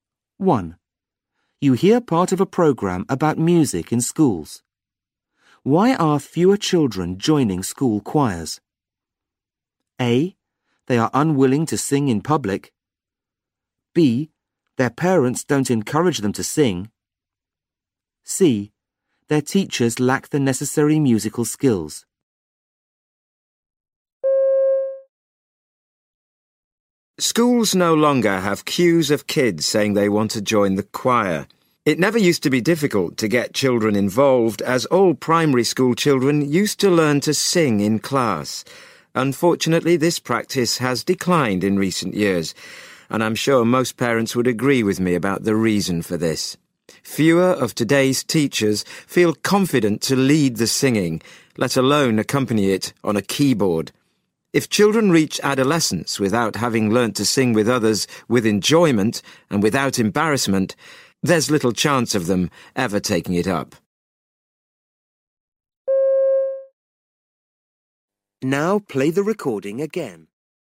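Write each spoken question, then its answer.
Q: Why are fewer children joining school choirs?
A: C: Their teachers lack the necessary musical skills.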